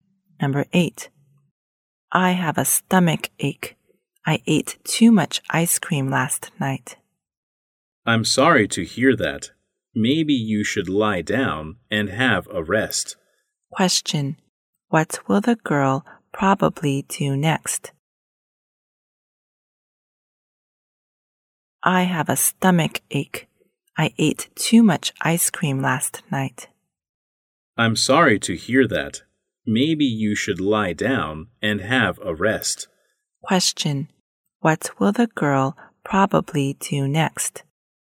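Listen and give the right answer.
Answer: Lie down and have a rest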